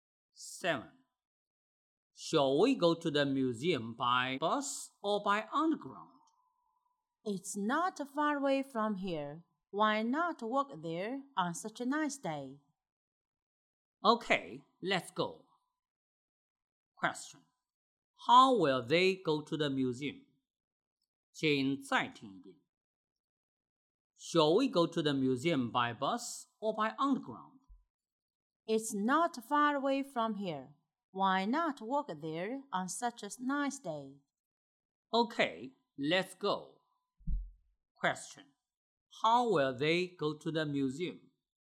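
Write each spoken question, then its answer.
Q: How will they go to the museum?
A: On foot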